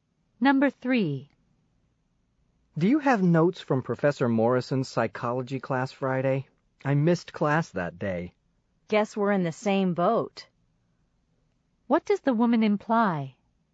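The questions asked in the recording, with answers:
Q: What does the woman imply?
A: She also missed the class, so she has no notes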